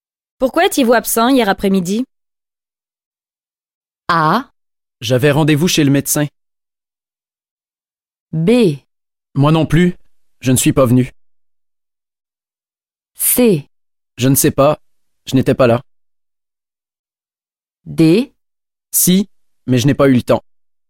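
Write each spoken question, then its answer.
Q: Pourquoi étiez-vous absent hier après-midi?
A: A: J'avais rendez-vous chez le médecin.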